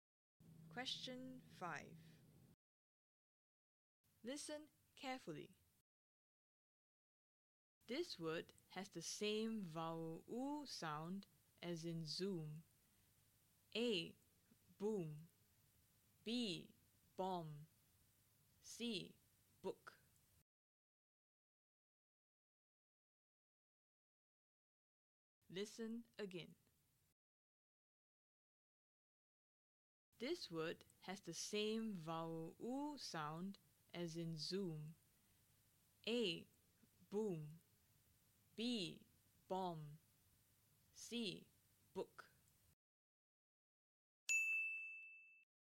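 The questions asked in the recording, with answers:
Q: This word has the same vowel U sound as in zoom.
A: A: Boom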